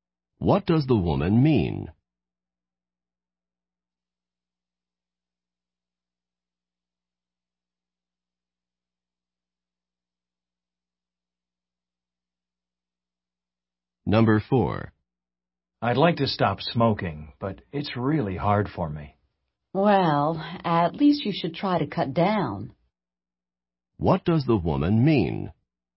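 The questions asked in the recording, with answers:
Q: What does the woman mean?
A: He should at least try to smoke less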